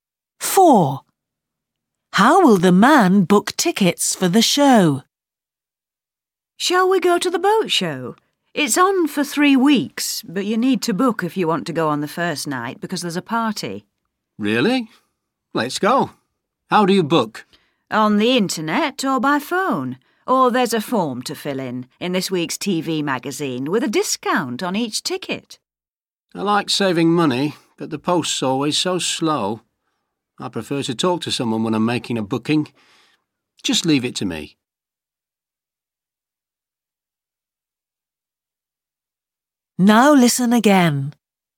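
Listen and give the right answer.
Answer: By phone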